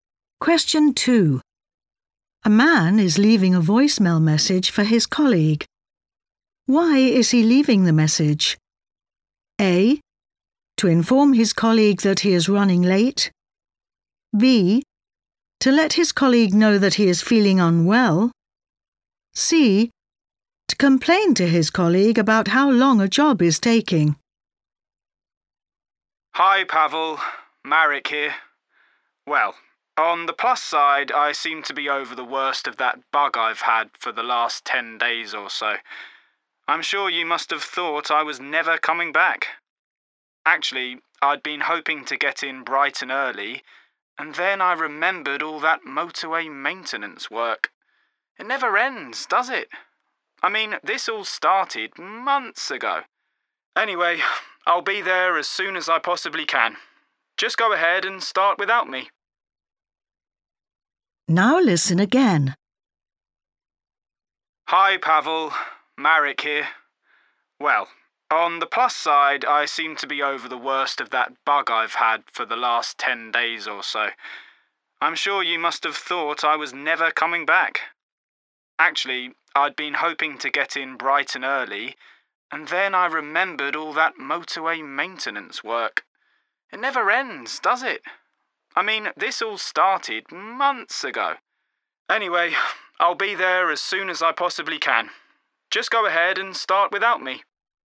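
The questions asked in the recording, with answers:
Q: Why is he leaving the message?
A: A: To inform his colleague that he is running late.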